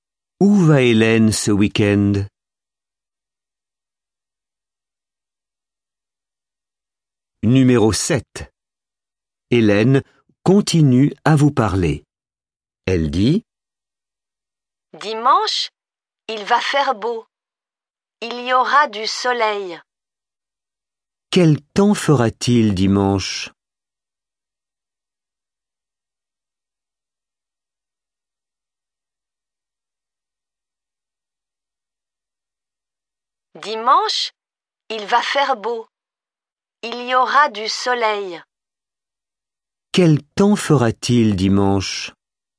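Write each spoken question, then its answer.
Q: Quel temps fera-t-il dimanche?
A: Il fera beau, du soleil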